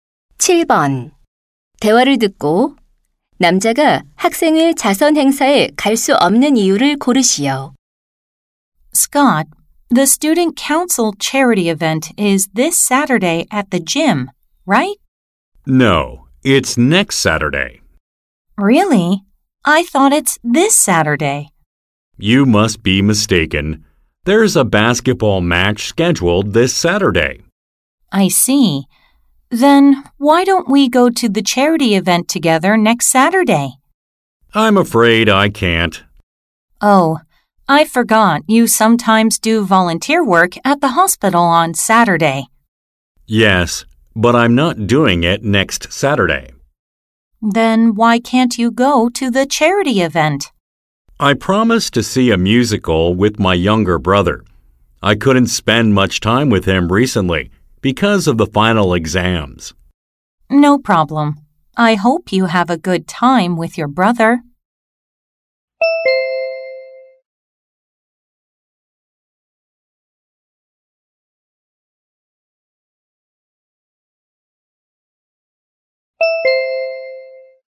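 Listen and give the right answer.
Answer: 남동생과 뮤지컬을 보기로 약속해서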